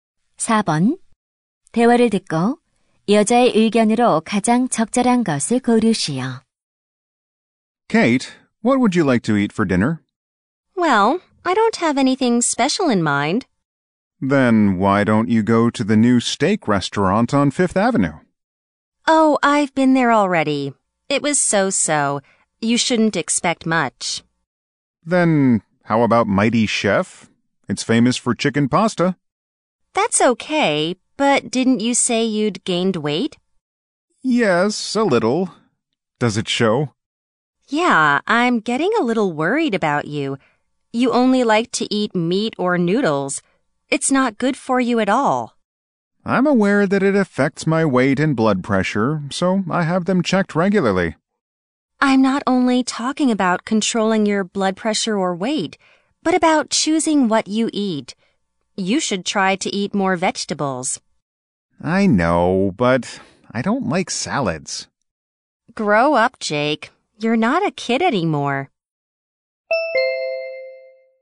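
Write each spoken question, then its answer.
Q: 대화를 듣고 여자의 의견으로 가장 적절한 것을 고르시오.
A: 건강을 위해 채소를 더 먹는 등 음식을 잘 골라 먹어야 한다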